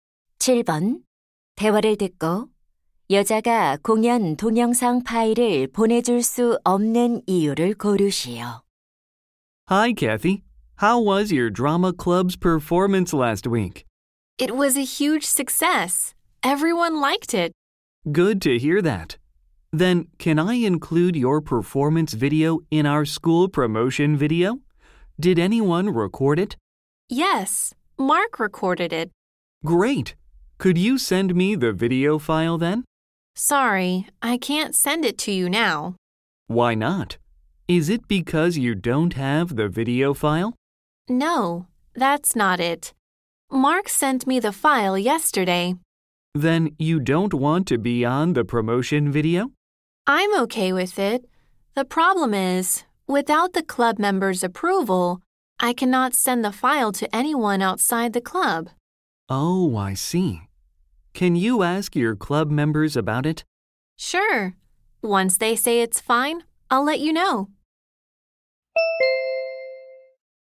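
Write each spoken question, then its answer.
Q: 대화를 듣고 여자가 공연 동영상 파일을 보내줄 수 없는 이유를 고르시오.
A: 동아리 회원들의 승인을 받지 않아서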